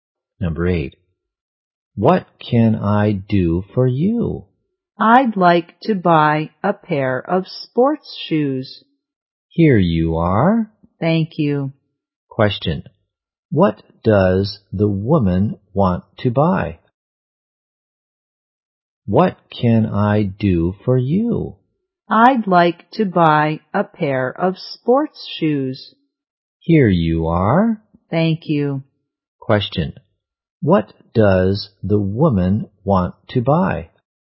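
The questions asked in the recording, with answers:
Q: what does the woman want to buy?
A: A pair of sports shoes.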